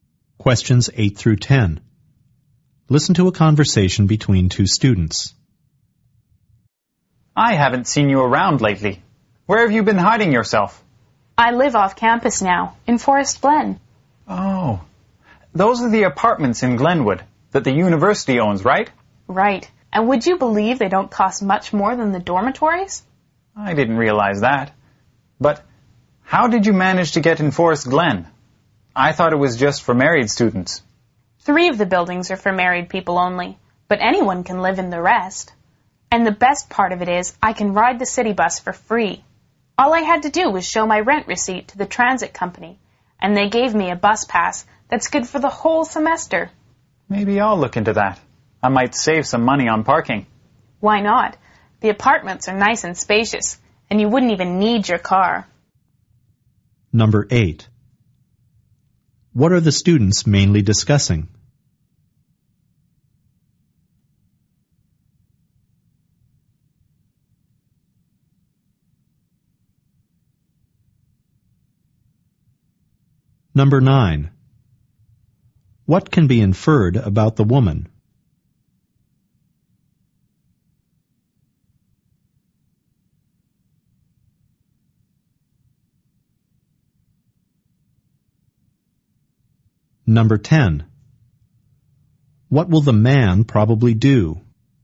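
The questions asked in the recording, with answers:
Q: What are the students mainly discussing?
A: Living in the Forest Glen apartments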